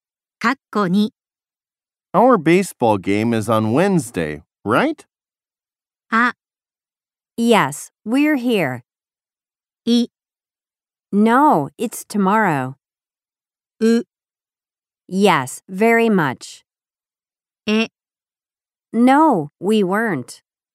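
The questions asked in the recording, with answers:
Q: Our baseball game is on Wednesday, right?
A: い: No, it's tomorrow.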